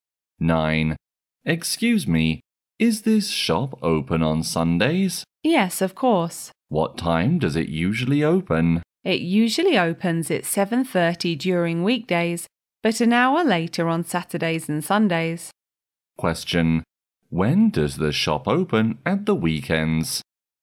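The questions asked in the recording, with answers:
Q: When does the shop open at the weekends?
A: At 8:30.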